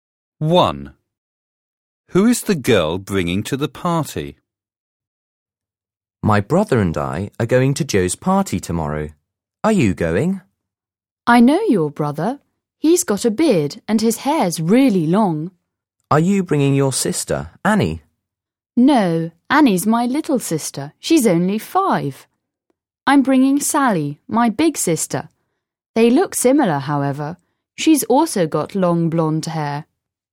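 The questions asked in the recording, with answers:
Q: Who is the girl bringing to the party?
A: Her big sister, Sally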